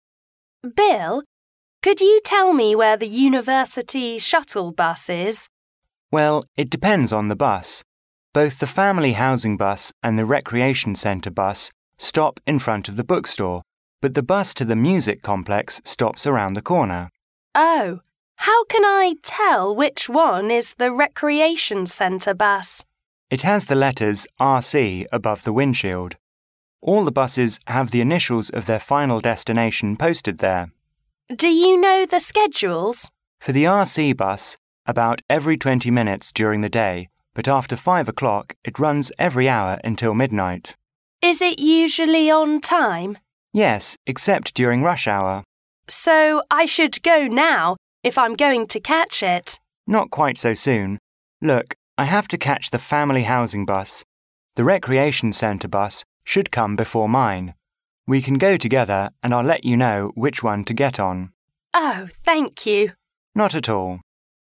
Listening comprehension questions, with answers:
Directions:Each conversation will be read only once. At the end of each conversation, there will be a one-minute pause. During the pause, read the four choices marked A, B, C and D, and decide which is the best answer or complete the following sentences with one word according to what you hear.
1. _____ University Shuttle Bus lines are introduced in this conversation.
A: Three/3

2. The woman wants to know the location of the Recreation Centre Bus stop which has the letters of"RC"_____ the windshield.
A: above

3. The Recreation Centre Bus runs every _____ minutes during the day.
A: twenty

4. Bill says the Recreation Centre Bus runs always on time except the _____ hour.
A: rush

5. Bill is going to take the Family Housing Bus which is arriving _____ than the Recreation Centre Bus.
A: later

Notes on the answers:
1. 录音中Bill介绍了三种校车:Family Housing Bus,Recreation Centre Bus和Music Complex bus,故答案为Three/3。
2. 在女方问到如何辨认RC bus时,Bill的回答是只需要看校车挡风玻璃上的缩写,故答案为above。
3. 录音中Bill提到RC bus的发车时间是白天每20分钟一班,故答案为twenty。
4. 在女方问到RC bus的运营是否准时,Bill回答道是的,除了高峰时间段以外,故答案为rush。
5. 对话后半部分女方问如果她要赶上RC bus是否需要现在就出发,Bill说不用急,RC bus会在他要乘坐的FH bus之前到站,可以等他一起过去这样他就能告诉她该坐哪辆。故答案为later。

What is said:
W: Bill, could you tell me where the University Shuttle Bus is?
M: Well, it depends on the bus. Both the Family Housing Bus and the Recreation Centre Bus stop in front of the bookstore, but the bus to the Music Complex stops around the comer.
W: Oh, how can I tell which one is the Recreation Centre Bus?
M: It has the letters"RC"above the windshield. All the buses have the initials of their final destination posted there.
W: Do you know the schedules?
M: For the"RC"bus, about every twenty minutes during the day, but after five o'clock, it runs every hour until midnight.
W: Is it usually on time?
M: Yes, except during rush hour.
W: So I should go now if I'm going to catch it?
M: Not quite so soon. Look, I have to catch the Family Housing Bus. The Recreation Centre Bus should come before mine. We can go together and I'll let you know which one to get on.
W: Oh, thank you.
M: Not at all.